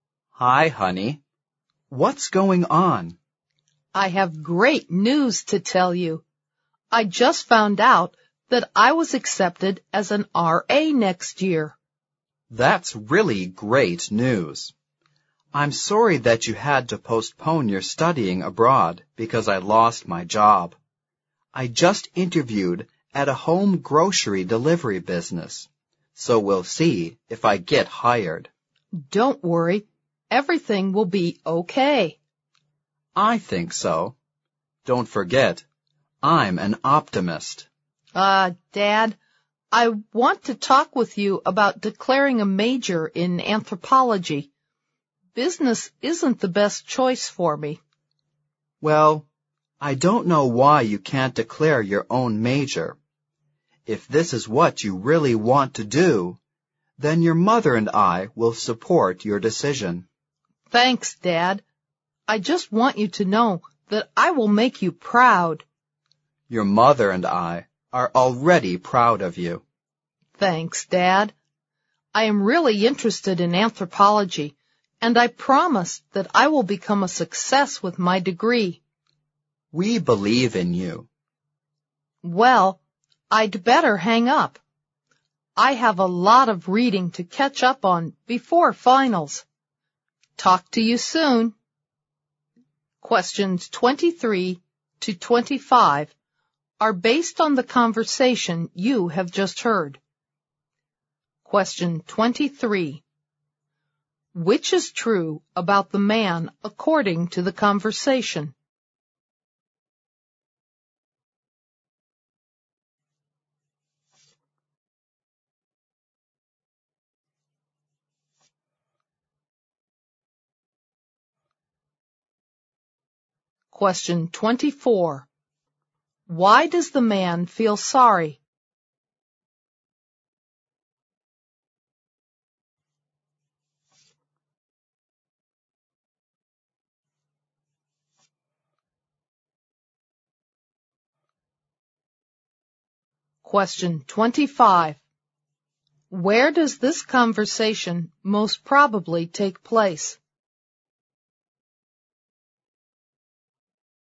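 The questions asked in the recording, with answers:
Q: Why does the man feel sorry?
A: Because his daughter had to postpone studying abroad after he lost his job.

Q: Where does this conversation most probably take place?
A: On the phone.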